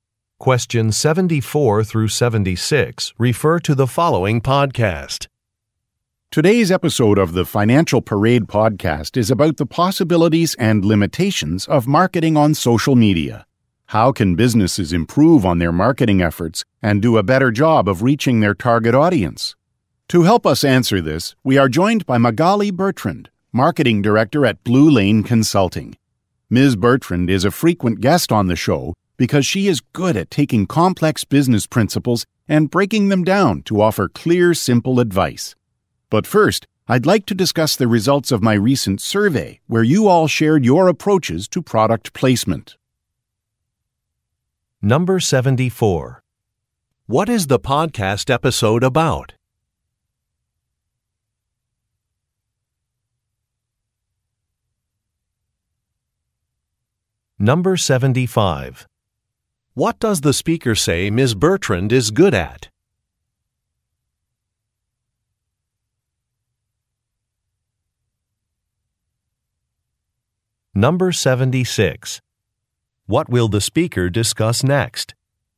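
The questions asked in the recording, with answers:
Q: What is the podcast episode about?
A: Marketing on social media

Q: What does the speaker say Ms.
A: Breaking down complex business principles into clear, simple advice

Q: What will the speaker discuss next?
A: The results of a recent survey on product placement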